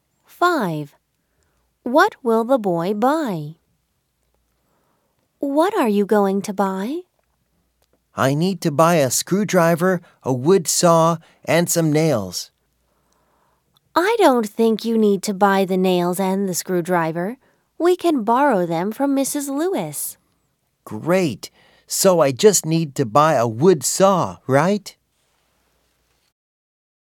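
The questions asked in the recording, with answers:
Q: What will the boy buy?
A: A wood saw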